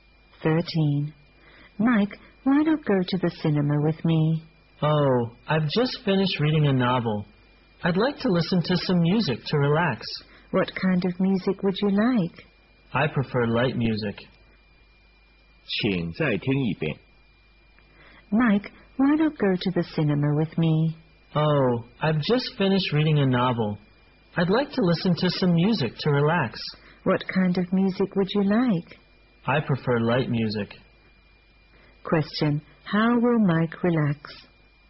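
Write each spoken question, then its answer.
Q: How will Mike relax?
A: By listening to light music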